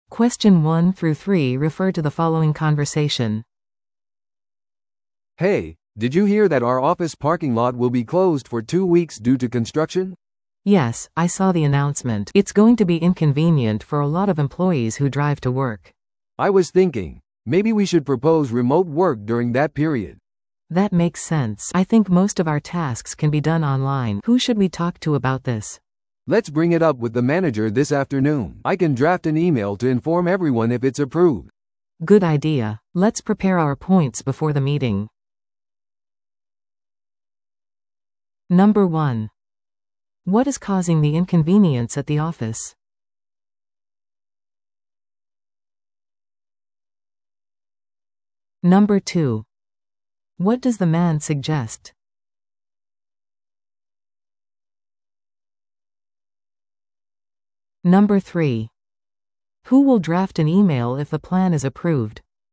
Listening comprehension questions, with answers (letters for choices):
Listen to the audio below and answer the questions.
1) What is causing the inconvenience at the office?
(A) 会社全体の会議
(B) 停電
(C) 駐車場の工事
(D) オフィスの方針変更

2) What does the man suggest?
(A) 別のオフィスへの移動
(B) 在宅勤務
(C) 公共交通機関の利用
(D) プロジェクトの延期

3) Who will draft an email if the plan is approved?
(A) マネージャー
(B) 女性社員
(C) 男性社員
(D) 人事部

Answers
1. C
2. B
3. C

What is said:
A: "Hey, did you hear that our office parking lot will be closed for two weeks due to construction?"
B: "Yes, I saw the announcement. It's going to be inconvenient for a lot of employees who drive to work."
A: "I was thinking, maybe we should propose remote work during that period."
B: "That makes sense. I think most of our tasks can be done online. Who should we talk to about this?"
A: "Let's bring it up with the manager this afternoon. I can draft an email to inform everyone if it's approved."
B: "Good idea! Let's prepare our points before the meeting."